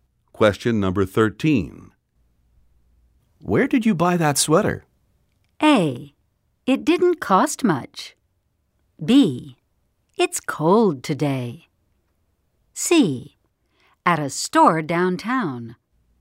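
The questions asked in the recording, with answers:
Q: Where did you buy that sweater?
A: C: At a store downtown.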